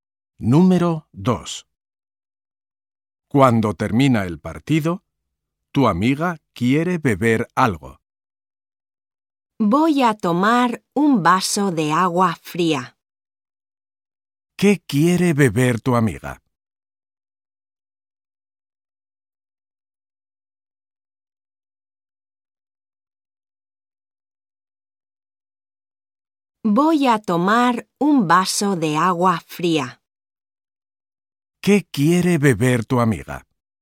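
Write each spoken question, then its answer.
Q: ¿Qué quiere beber tu amiga?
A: Un vaso de agua fría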